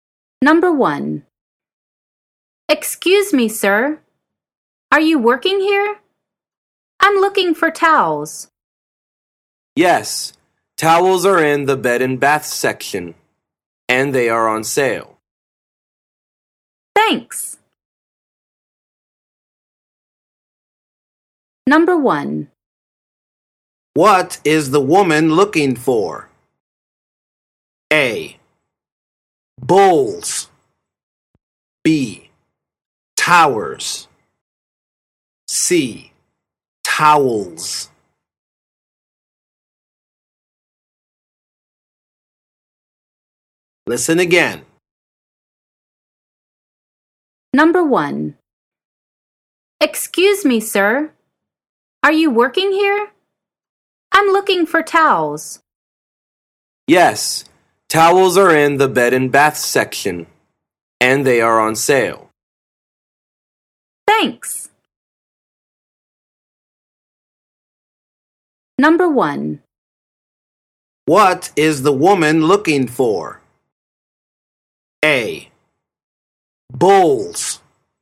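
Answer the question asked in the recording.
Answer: C: Towels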